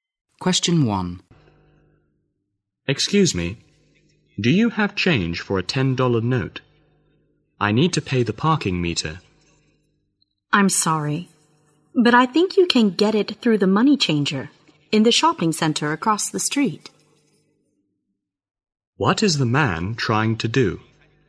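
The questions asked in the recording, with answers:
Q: What is the man trying to do?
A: Get change for a $10 note to pay the parking meter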